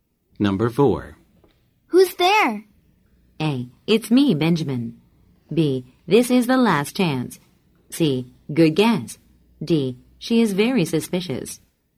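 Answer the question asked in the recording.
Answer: A: It's me, Benjamin.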